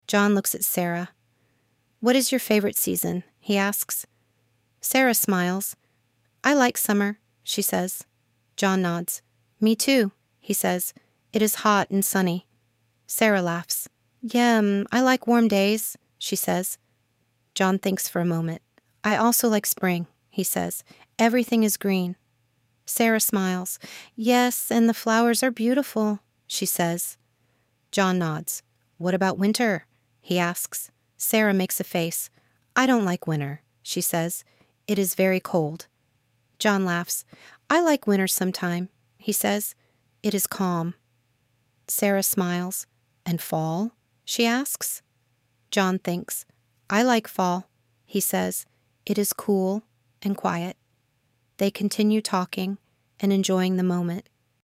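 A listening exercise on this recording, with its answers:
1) What is Sarah's favorite season?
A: Summer

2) Does John like summer?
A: Yes, it is hot and sunny

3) What does John like about spring?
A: Everything is green

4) Does Sarah like winter?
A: No, it is very cold

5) What does John think about fall?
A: He likes it; it is cool and quiet

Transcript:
John looks at Sarah.
"What is your favorite season?" he asks.
Sarah smiles.
"I like summer," she says.
John nods.
"Me too," he says.
"It is hot and sunny."
Sarah laughs.
"Yes, I like warm days," she says.
John thinks for a moment.
"I also like spring," he says.
"Everything is green."
Sarah smiles.
"Yes, and the flowers are beautiful," she says.
John nods.
"What about winter?" he asks.
Sarah makes a face.
"I don't like winter," she says.
"It is very cold."
John laughs.
"I like winter sometimes," he says.
"It is calm."
Sarah smiles.
"And fall?" she asks.
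John thinks.
"I like fall," he says.
"It is cool and quiet."
They continue talking and enjoying the moment.

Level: Inglês Básico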